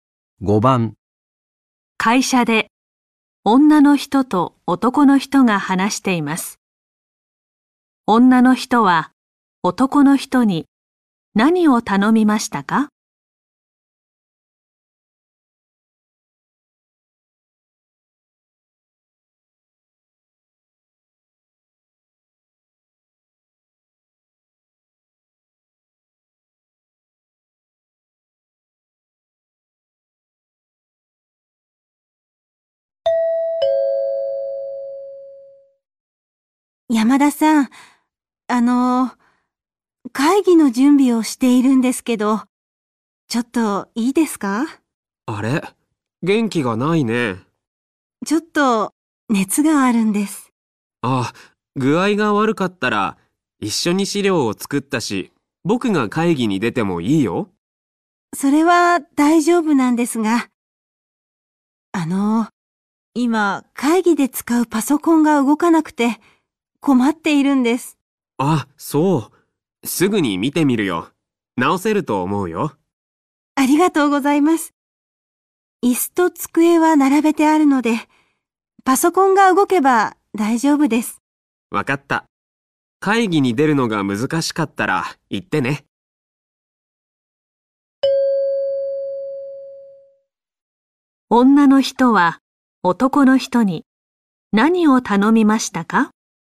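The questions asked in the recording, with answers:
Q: 女の人は男の人に何を頼みましたか?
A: パソコンを直すこと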